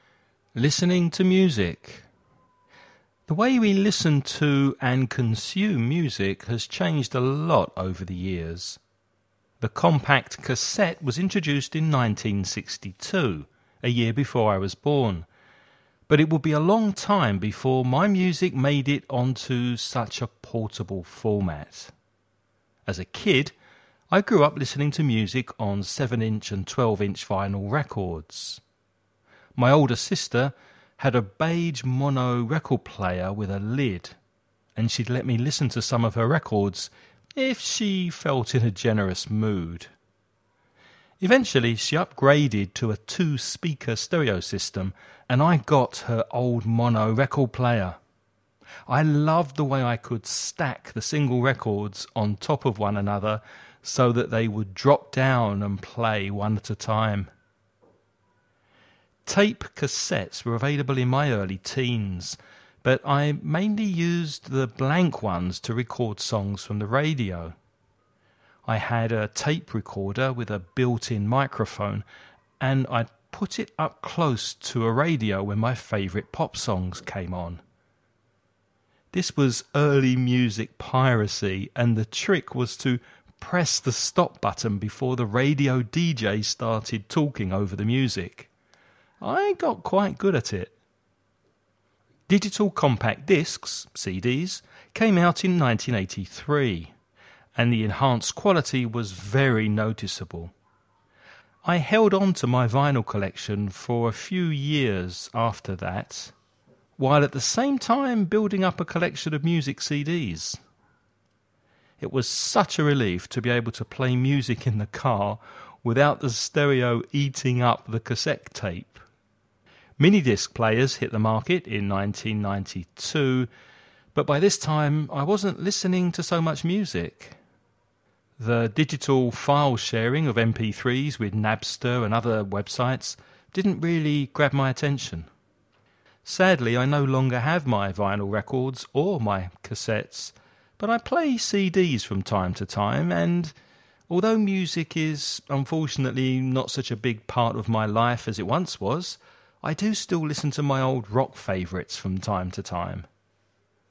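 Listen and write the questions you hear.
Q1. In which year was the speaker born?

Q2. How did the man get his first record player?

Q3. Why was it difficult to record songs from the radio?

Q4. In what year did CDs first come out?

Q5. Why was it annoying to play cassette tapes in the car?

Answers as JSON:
{"1": "1963", "2": "He got his older sister's old mono record player when she upgraded", "3": "You had to press stop before the DJ started talking over the music", "4": "1983", "5": "The stereo would eat up the cassette tape"}

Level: nivel avanzado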